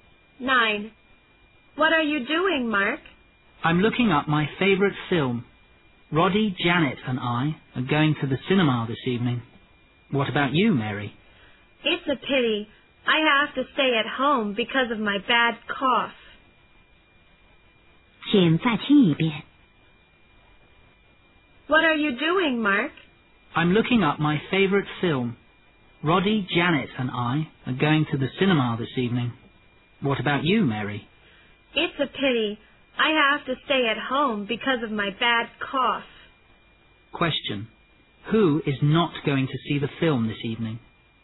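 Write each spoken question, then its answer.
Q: Who is not going to see the film this evening?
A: Mary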